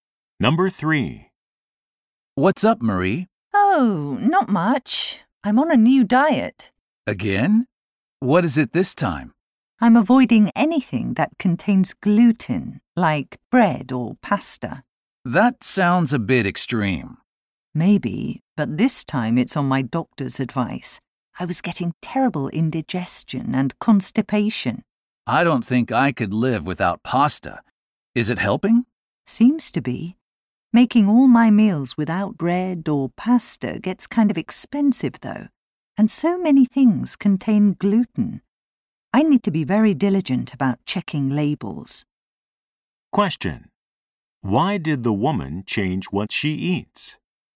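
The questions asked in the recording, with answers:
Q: Why did the woman change what she eats?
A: Her doctor advised it because of indigestion and constipation.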